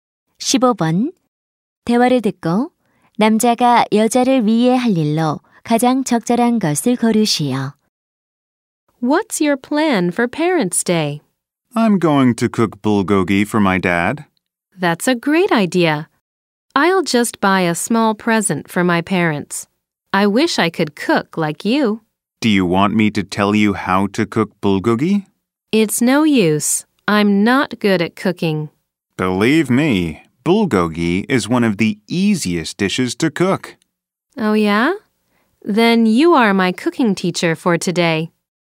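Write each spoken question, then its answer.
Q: 대화를 듣고 남자가 여자를 위해 할 일로 가장 적절한 것을 고르시오.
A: 불고기 요리법 가르쳐 주기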